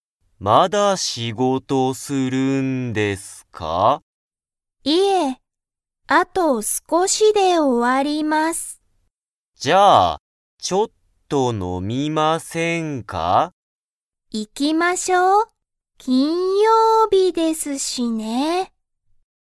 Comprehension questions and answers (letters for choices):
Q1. 今日(きょう)は____だ。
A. 木曜日(もくようび)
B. 金曜日(きんようび)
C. 土曜日(どようび)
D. 日曜日(にちようび)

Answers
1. B

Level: Level 1